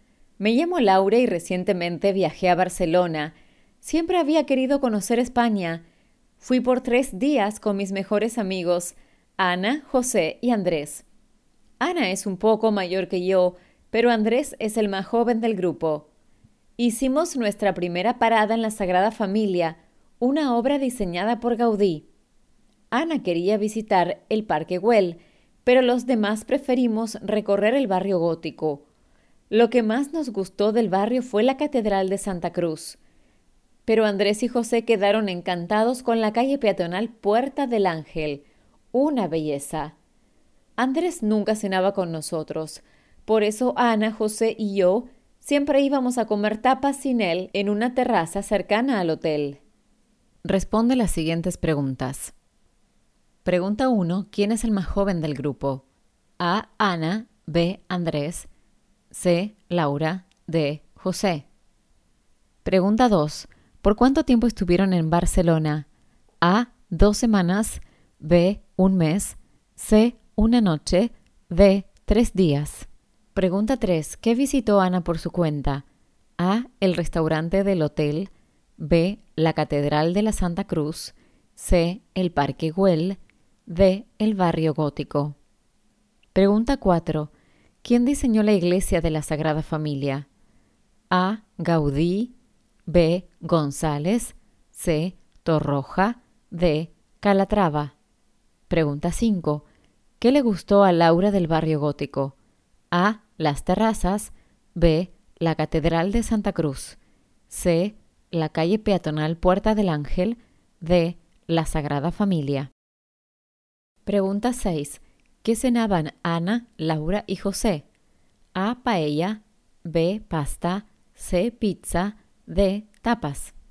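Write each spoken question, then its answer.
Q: ¿Quién es el más joven del grupo?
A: B: Andrés

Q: ¿Por cuánto tiempo estuvieron en Barcelona?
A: D: 3 días

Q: ¿Quién diseñó la iglesia de la Sagrada Familia?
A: A: Gaudí

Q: ¿Qué le gustó a Laura del barrio gótico?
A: B: La Catedral de Santa Cruz

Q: ¿Qué cenaban Ana, Laura y José?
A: D: Tapas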